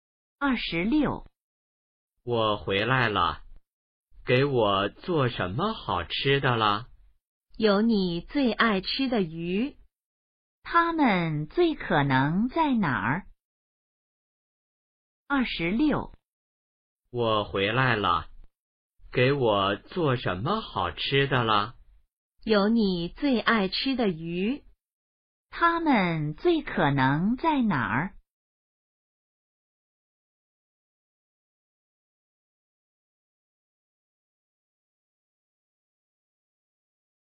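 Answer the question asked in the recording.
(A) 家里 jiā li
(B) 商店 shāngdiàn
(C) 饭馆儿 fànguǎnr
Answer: (A) 家里 jiā li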